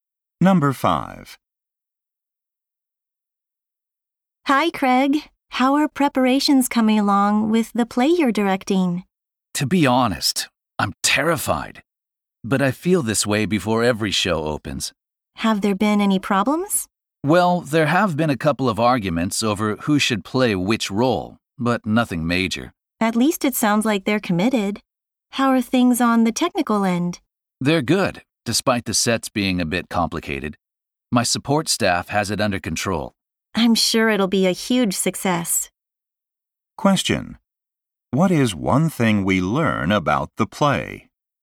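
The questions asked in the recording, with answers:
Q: What is one thing we learn about the play?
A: There have been arguments over who should play which role.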